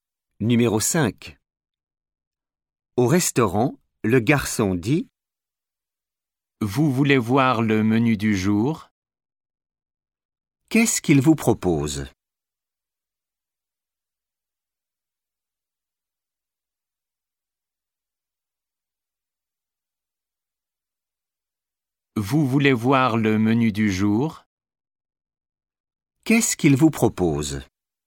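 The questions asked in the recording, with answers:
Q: Qu'est-ce qu'il vous propose ?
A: Le menu du jour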